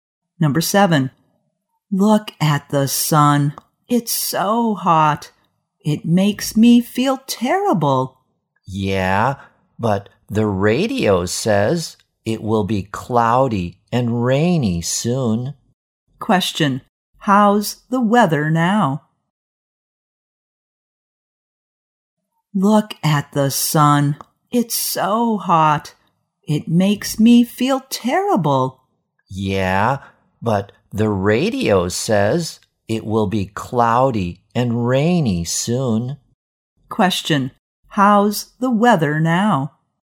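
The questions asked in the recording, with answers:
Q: How's the weather now?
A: Sunny and hot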